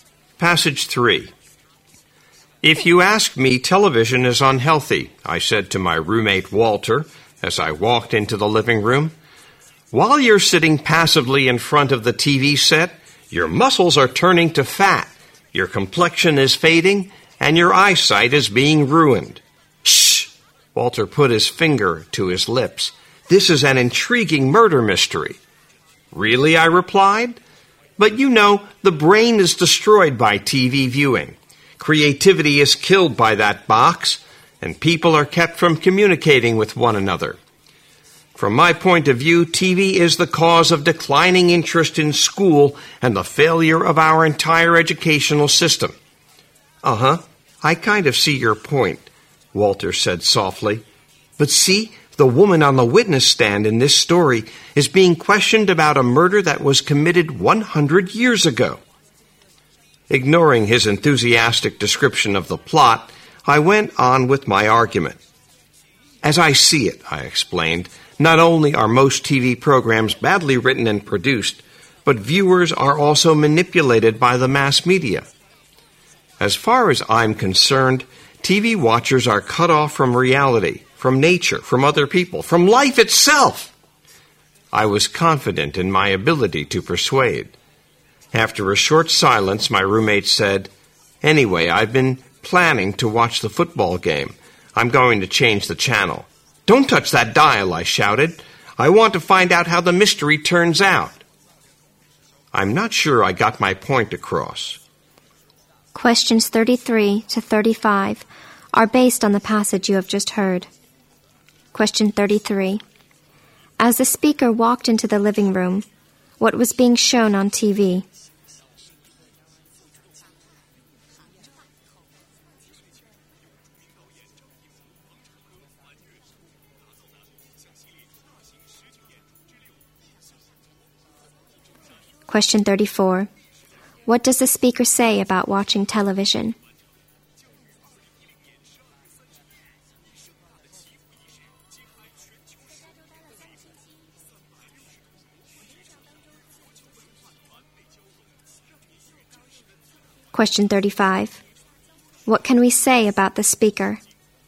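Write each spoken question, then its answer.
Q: As the speaker walked into the living room, what was being shown on TV?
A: A murder mystery.

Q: What does the speaker say about watching television?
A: It is unhealthy and harms the body, the mind and communication.

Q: What can we say about the speaker?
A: He got caught up in the TV show he had been criticizing.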